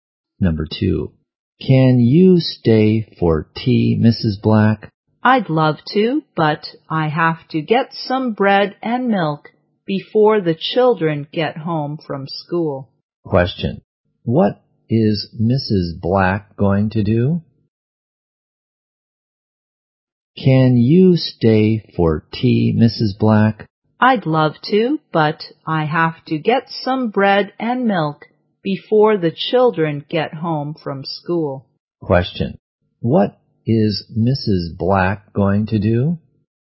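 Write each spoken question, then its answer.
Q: Question, what is Mrs. Black going to do?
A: Buy some bread and milk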